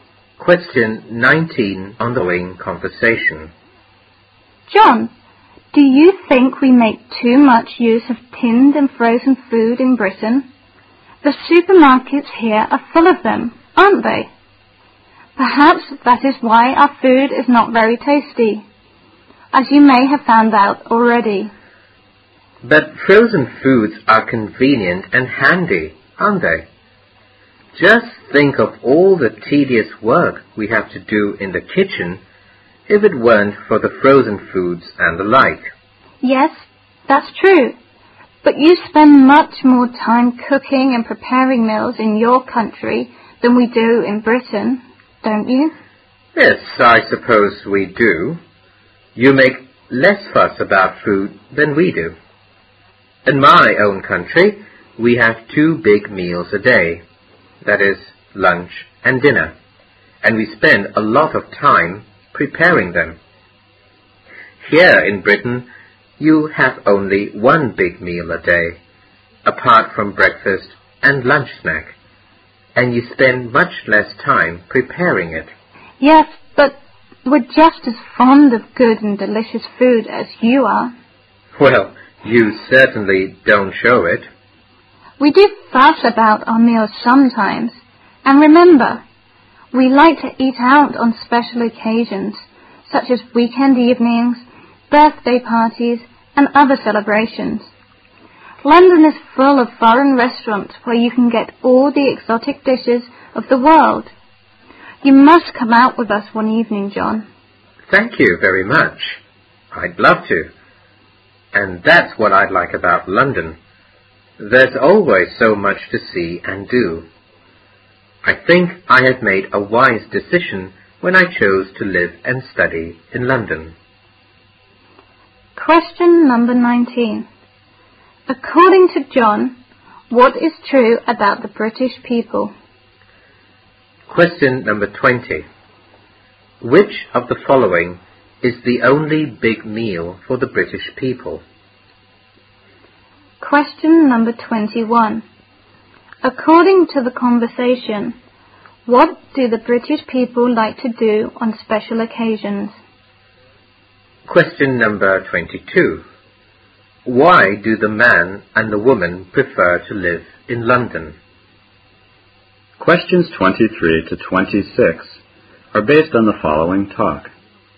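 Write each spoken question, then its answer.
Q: According to the conversation, what do the British people like to do on special occasions?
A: Eat out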